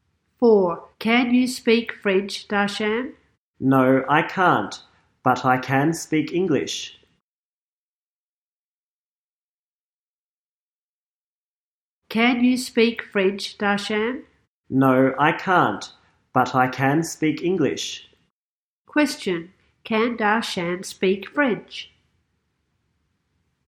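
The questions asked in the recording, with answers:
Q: Question, can Darshan speak French?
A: No, he can't.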